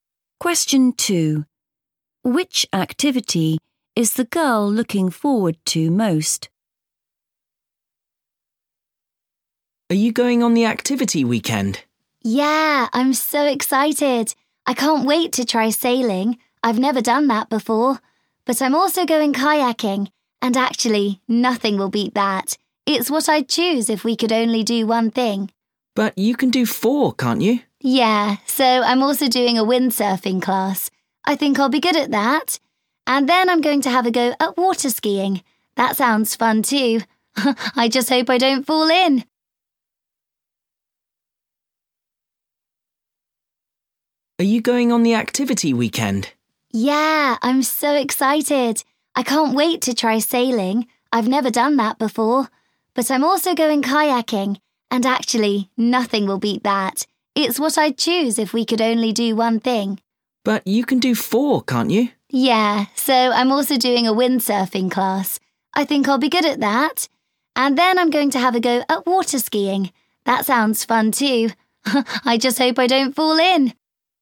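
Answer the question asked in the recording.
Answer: Kayaking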